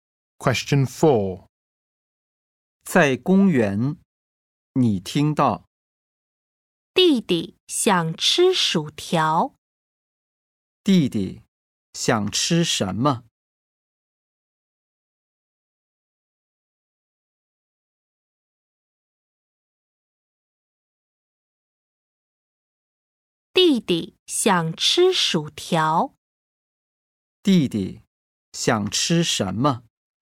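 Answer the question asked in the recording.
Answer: 薯条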